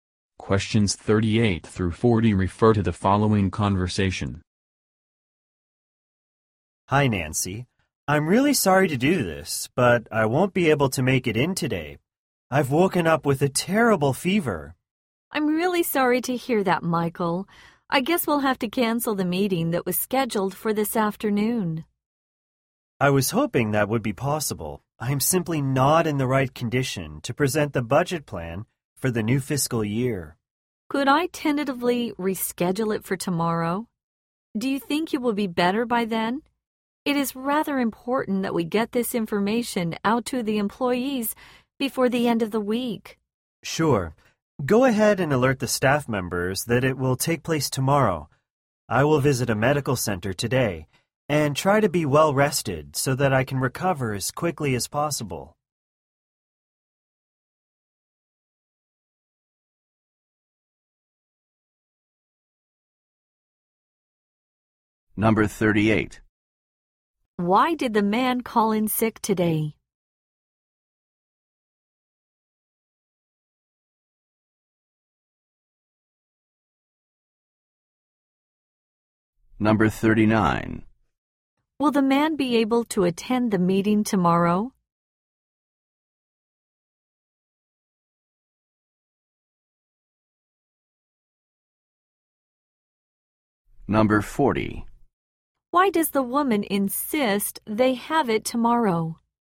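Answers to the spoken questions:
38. He has a terrible fever
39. Yes
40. The information must reach employees before the end of the week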